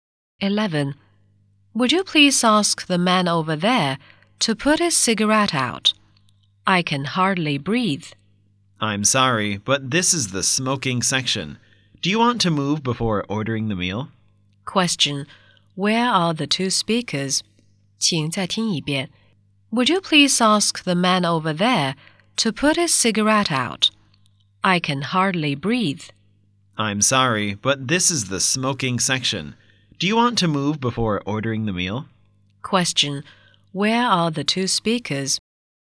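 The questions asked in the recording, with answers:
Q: Where are the two speakers?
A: In a restaurant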